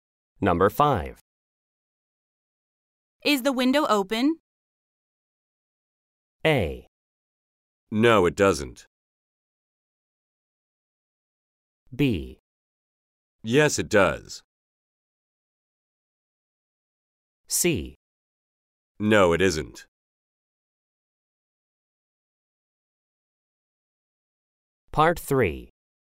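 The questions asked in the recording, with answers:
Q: Is the window open?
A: C: No, it isn't.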